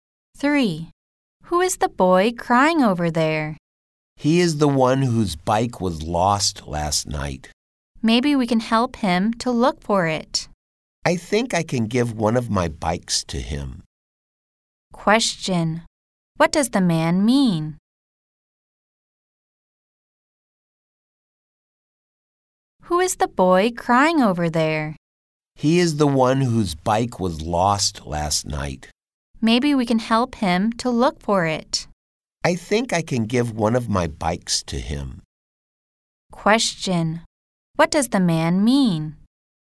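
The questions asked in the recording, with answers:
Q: Question. What does the man mean?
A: He can give the boy one of his bikes.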